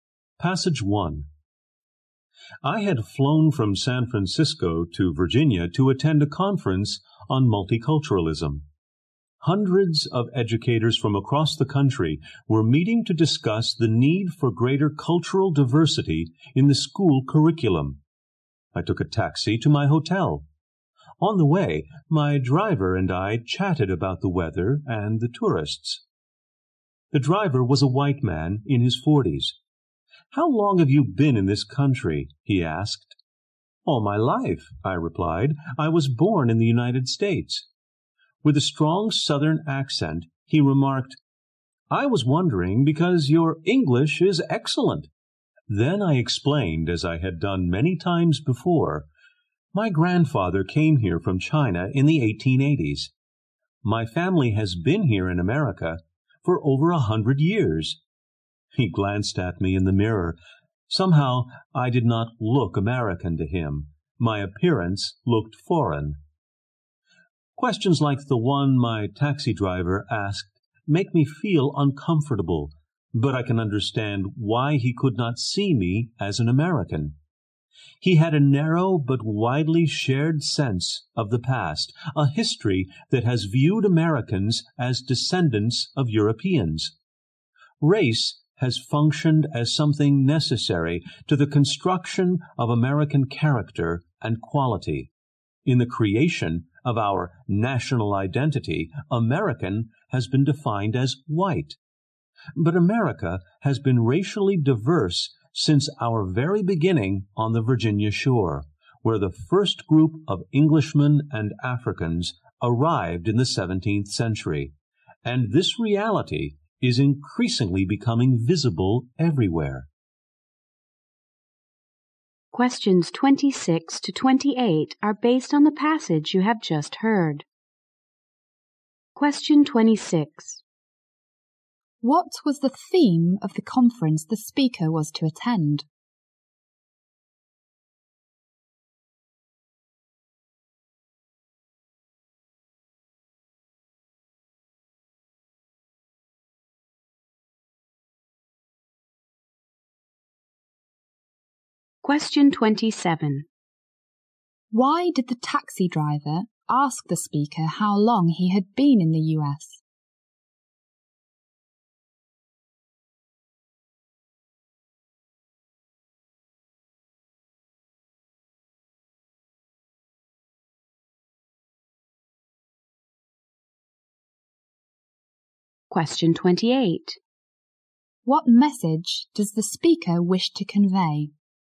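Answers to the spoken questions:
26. Multiculturalism: greater cultural diversity in the school curriculum.
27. The speaker's appearance looked foreign to him.
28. America has always been racially diverse, not only white.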